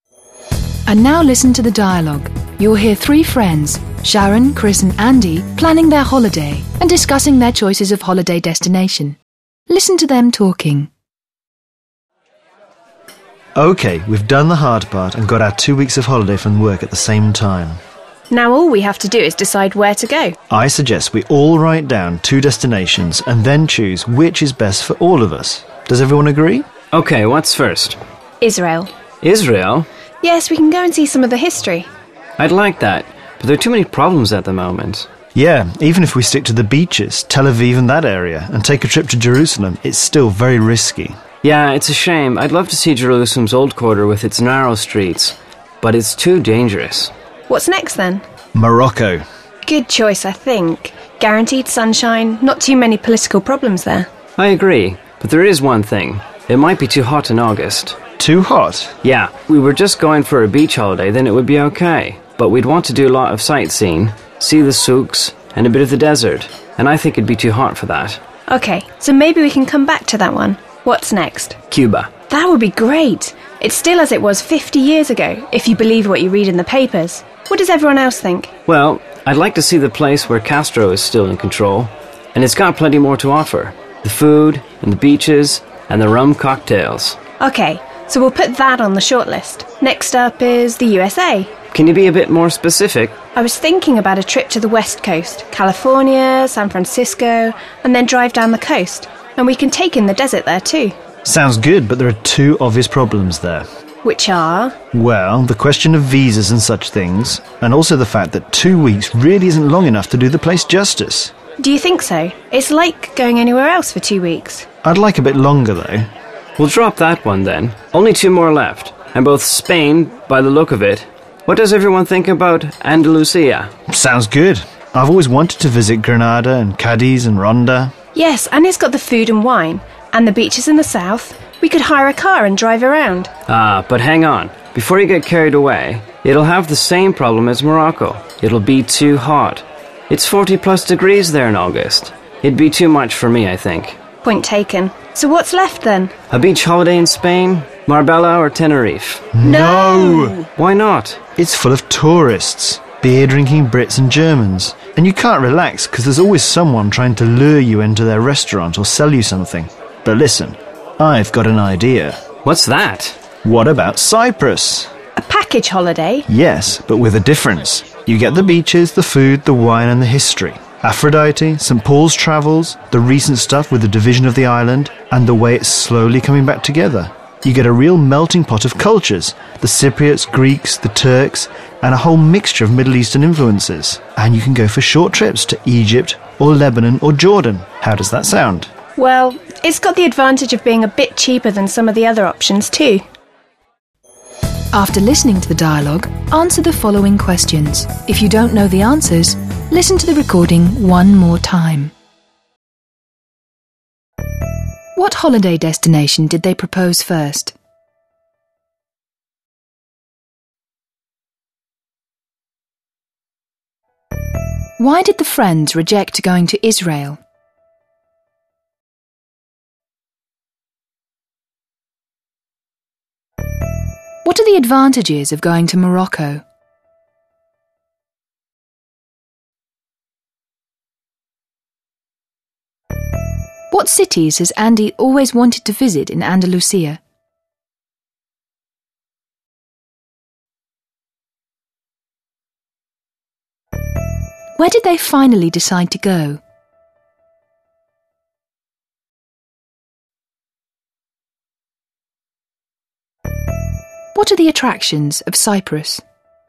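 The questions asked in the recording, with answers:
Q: What holiday destination did they propose first?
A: Israel

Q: Why did the friends reject going to Israel?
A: Too many problems at the moment; it's too risky and dangerous

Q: What are the advantages of going to Morocco?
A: Guaranteed sunshine and not too many political problems

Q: What are the attractions of Cyprus?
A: Beaches, food, wine, history, a melting pot of cultures, and short trips to Egypt, Lebanon or Jordan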